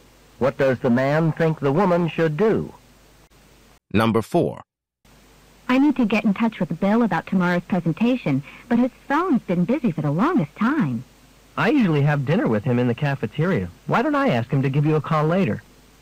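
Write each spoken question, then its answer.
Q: What will the man probably do?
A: Ask Bill at dinner to call the woman later.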